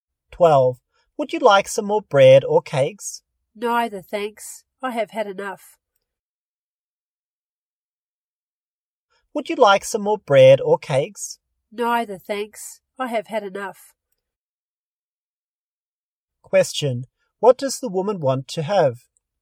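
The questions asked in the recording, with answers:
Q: What does the woman want to have?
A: Nothing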